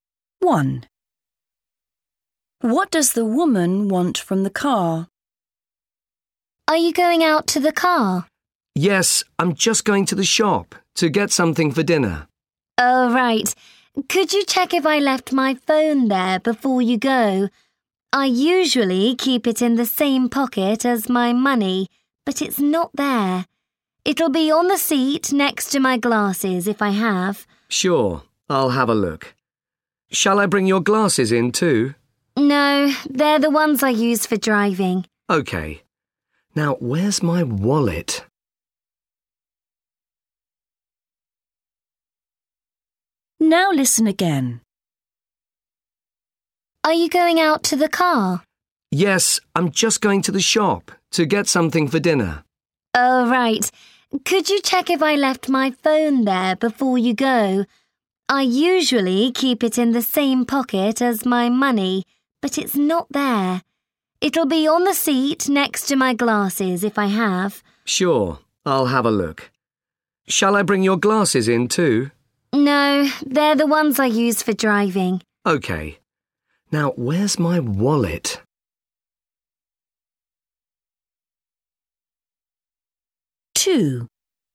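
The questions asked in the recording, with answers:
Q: What does the woman want from the car?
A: her phone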